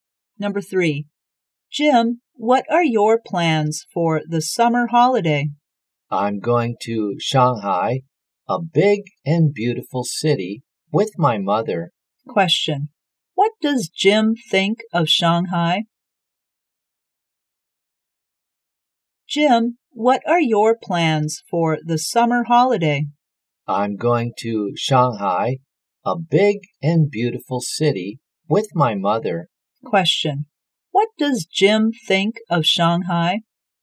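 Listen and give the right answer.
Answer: Big and beautiful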